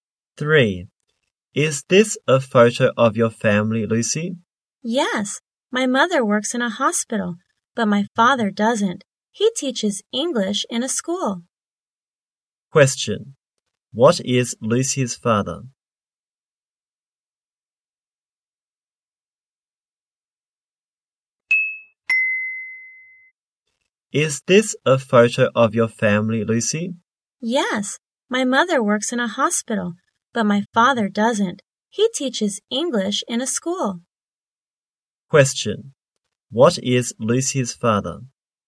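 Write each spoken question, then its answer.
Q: Question, what is Lucy's father?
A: An English teacher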